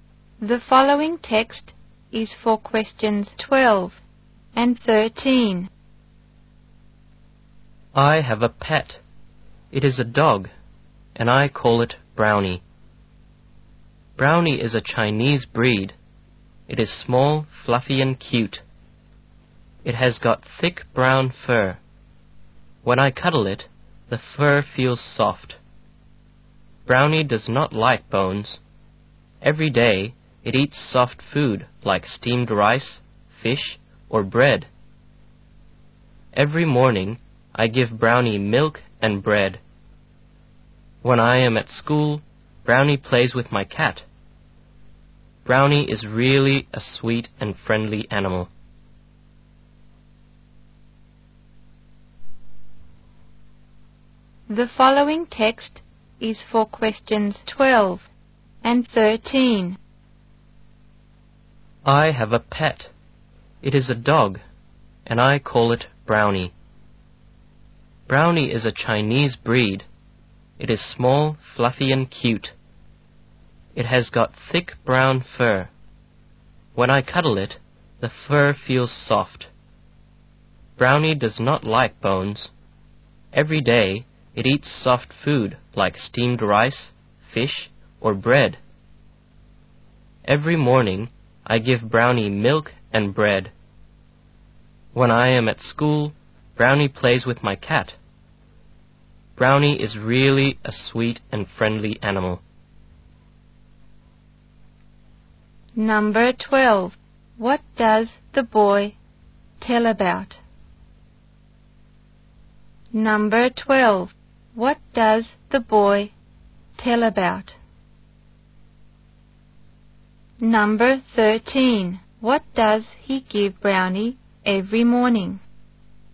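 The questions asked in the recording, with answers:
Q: What does the boy tell about?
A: His pet dog, Brownie

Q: What does he give Brownie every morning?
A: Milk and bread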